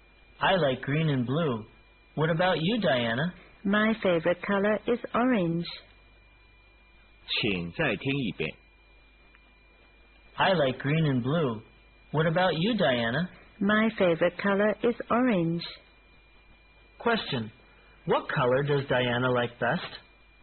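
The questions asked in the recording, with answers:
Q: What color does Diana like best?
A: Orange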